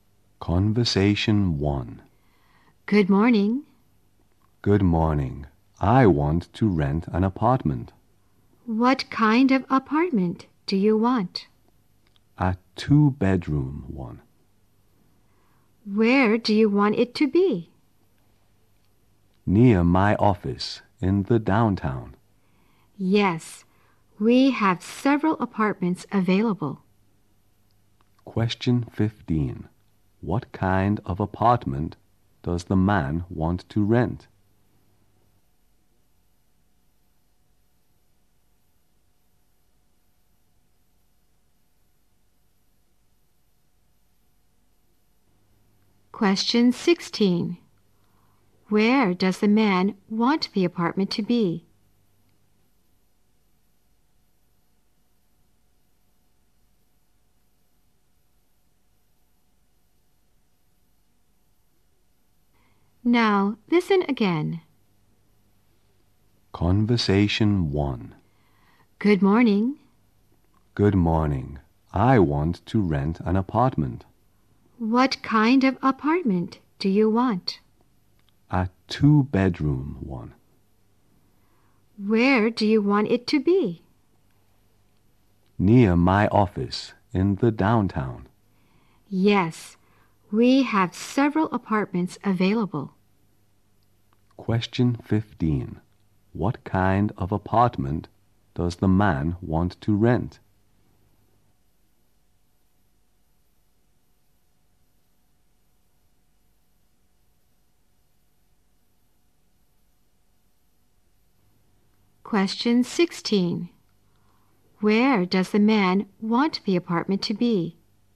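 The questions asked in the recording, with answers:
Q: Question 15. What kind of apartment does the man want to rent?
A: A two-bedroom apartment

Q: Question 16. Where does the man want the apartment to be?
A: Near his office downtown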